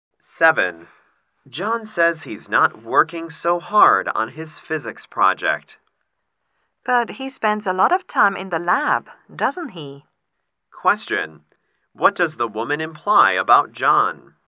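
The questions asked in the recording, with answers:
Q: What does the woman imply about John?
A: John is actually working hard on his project.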